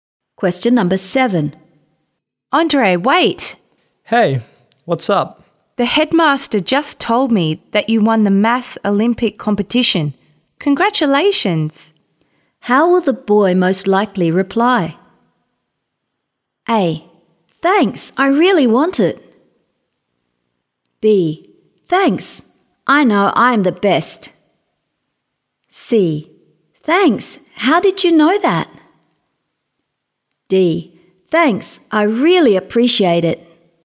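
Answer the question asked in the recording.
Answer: D: Thanks, I really appreciate it.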